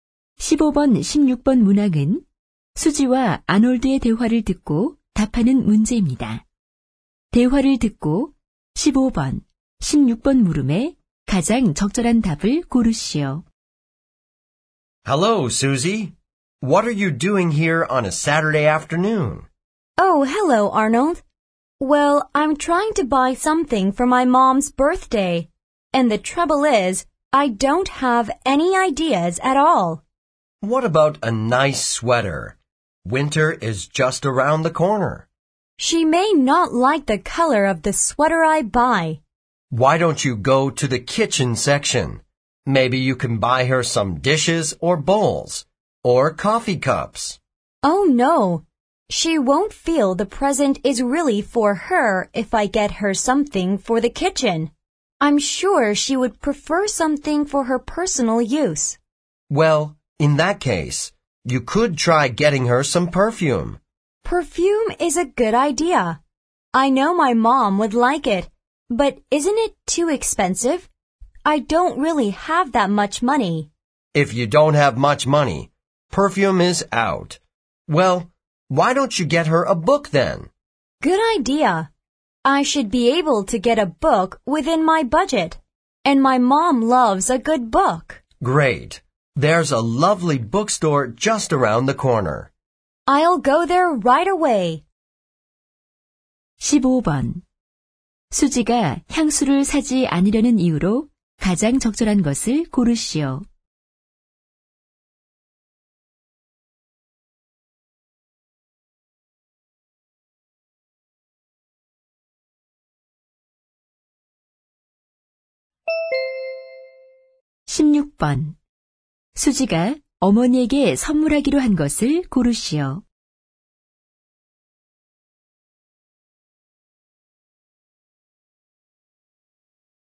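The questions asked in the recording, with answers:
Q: 수지가 향수를 사지 않으려는 이유로 가장 적절한 것을 고르시오.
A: 너무 비싸서 (돈이 부족해서)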